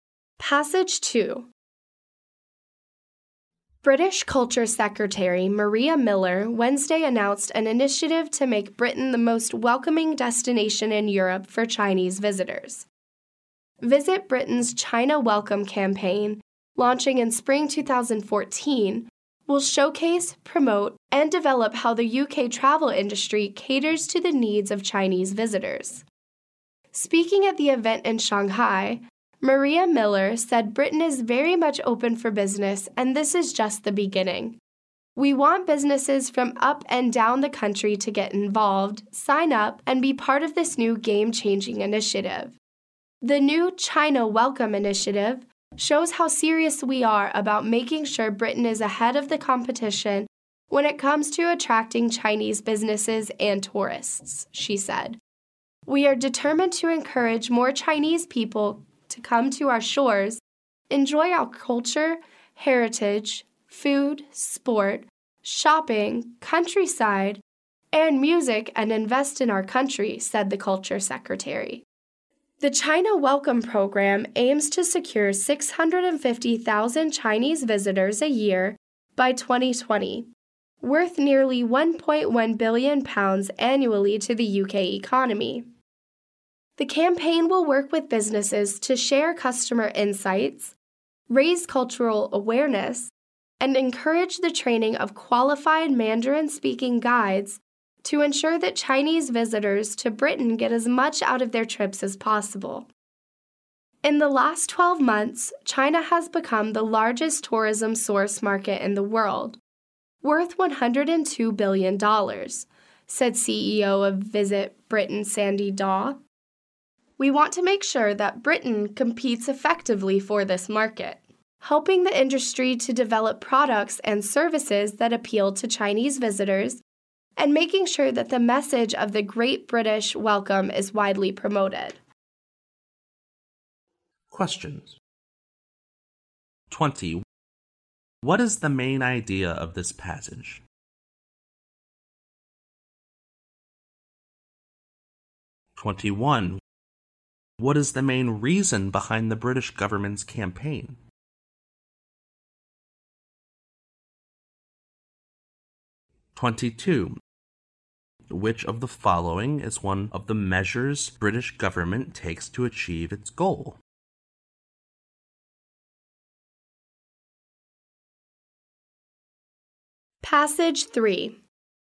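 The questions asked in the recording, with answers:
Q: What is the main idea of this passage?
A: Britain's China Welcome campaign to attract Chinese visitors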